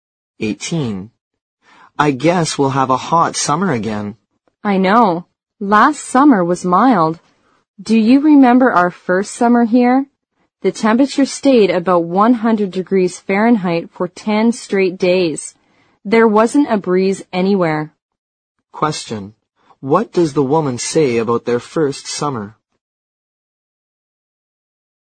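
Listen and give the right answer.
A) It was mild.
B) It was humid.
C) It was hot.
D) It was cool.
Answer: C) It was hot.

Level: 六级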